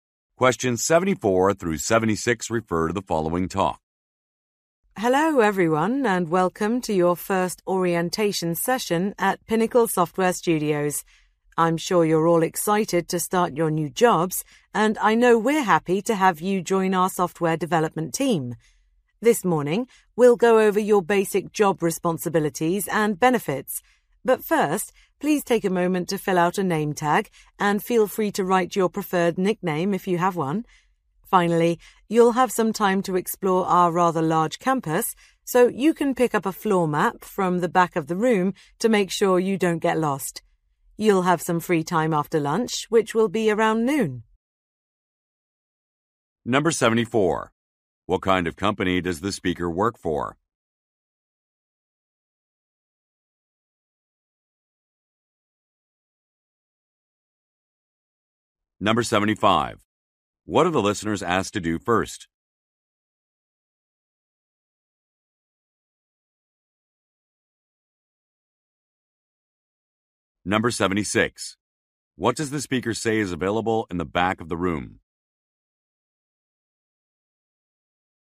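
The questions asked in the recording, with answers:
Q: What kind of company does the speaker work for?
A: A software company

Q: What are the listeners asked to do first?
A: Fill out a name tag

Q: What does the speaker say is available in the back of the room?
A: Floor maps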